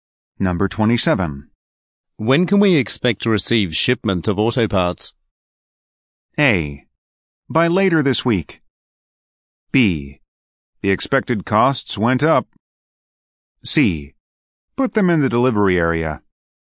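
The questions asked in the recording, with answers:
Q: When can we expect to receive shipment of auto parts?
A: A: By later this week.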